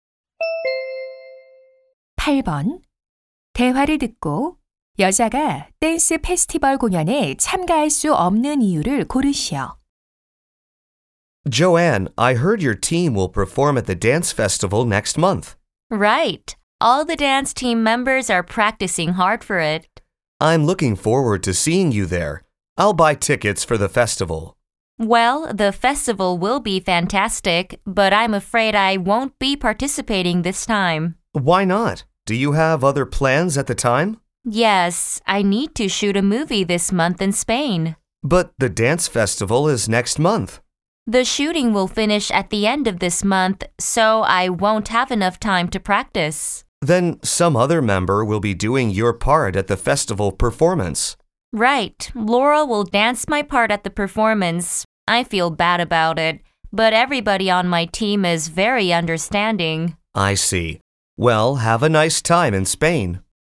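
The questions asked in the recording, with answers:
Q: 대화를 듣고 여자가 댄스 페스티벌 공연에 참가할 수 없는 이유를 고르시오.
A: 스페인에서 영화를 촬영해서 연습할 시간이 부족하므로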